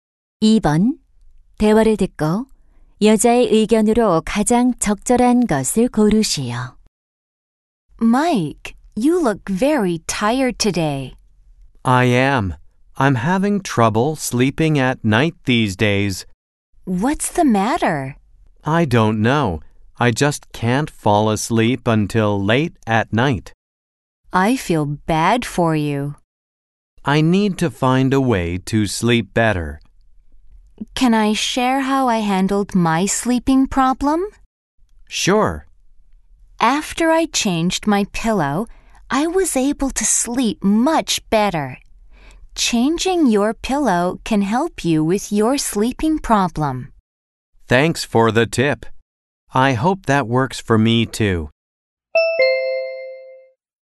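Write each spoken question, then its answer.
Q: 대화를 듣고 여자의 의견으로 가장 적절한 것을 고르시오.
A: 베개를 바꾸면 수면 문제에 도움이 된다.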